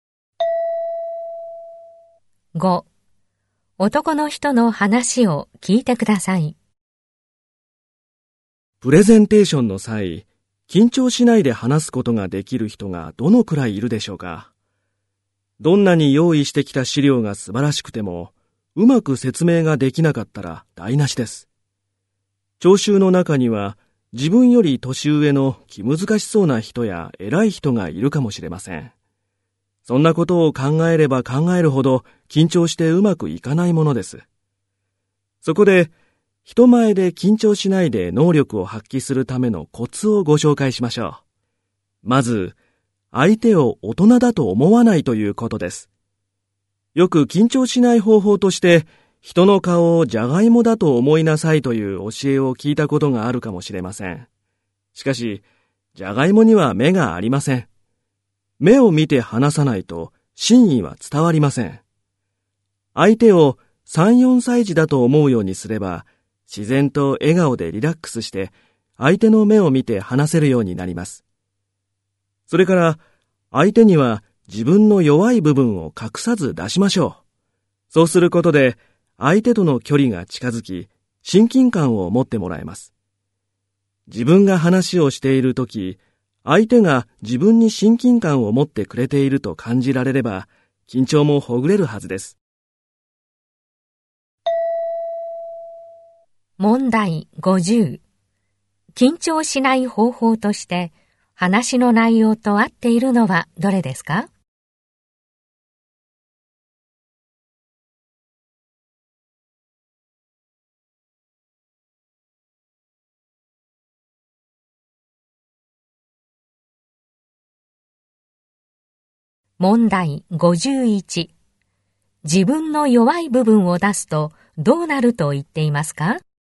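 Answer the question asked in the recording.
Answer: 相手との距離が近づき、親近感を持ってもらえる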